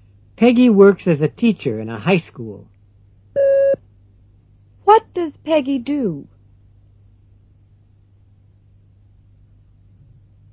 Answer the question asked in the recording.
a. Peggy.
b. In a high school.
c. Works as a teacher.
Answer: c. Works as a teacher.

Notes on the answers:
Peggy works as a teacher in a high school. What does Peggy do?

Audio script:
2.Peggy works as a teacher in a high school. What does Peggy do? (c)